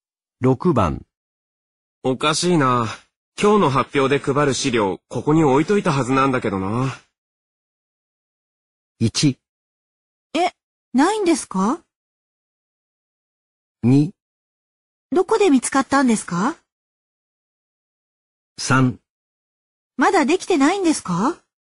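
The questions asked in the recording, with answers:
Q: おかしいな。今日の発表で配る資料、ここに置いといたはずなんだけどな。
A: 1: え、ないんですか?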